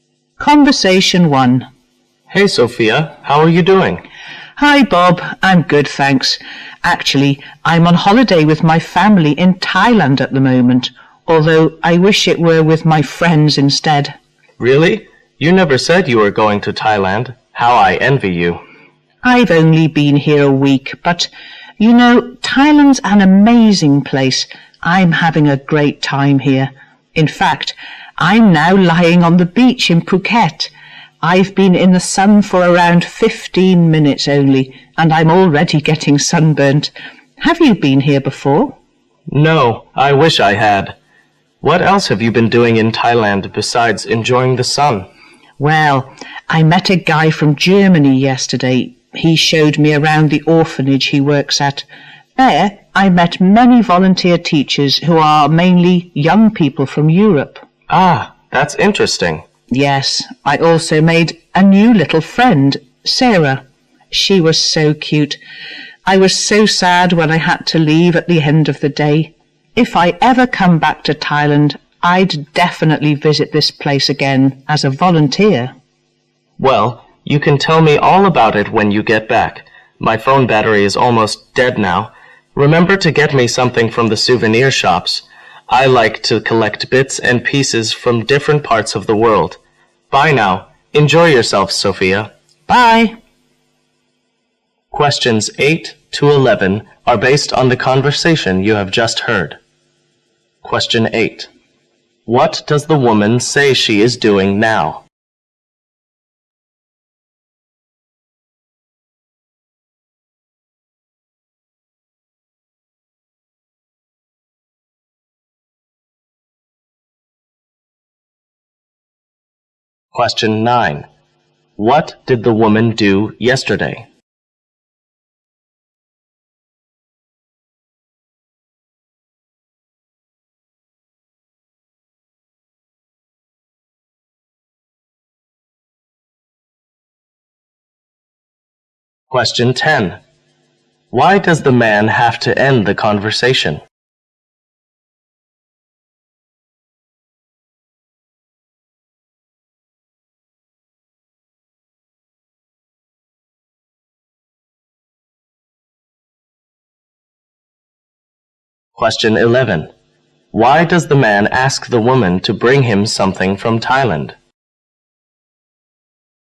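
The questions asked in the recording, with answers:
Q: What does the woman say she is doing now?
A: Lying on the beach in Phuket, on holiday with her family in Thailand

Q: What did the woman do yesterday?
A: She visited an orphanage that a German man works at

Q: Why does the man have to end the conversation?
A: His phone battery is almost dead

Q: Why does the man ask the woman to bring him something from Thailand?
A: He likes to collect bits and pieces from different parts of the world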